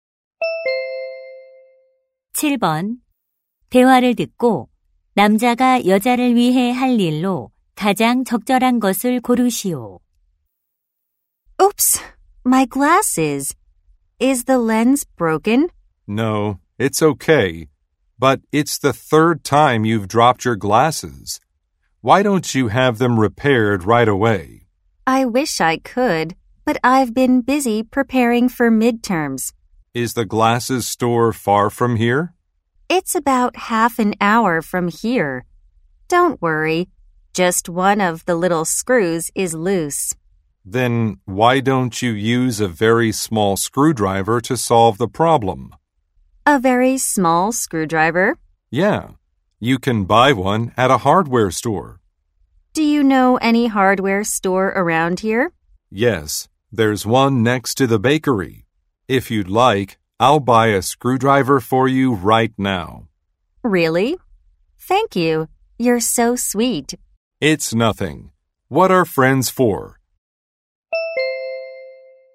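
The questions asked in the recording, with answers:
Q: 대화를 듣고 남자가 여자를 위해 할 일로 가장 적절한 것을 고르시오.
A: 작은 드라이버 사 오기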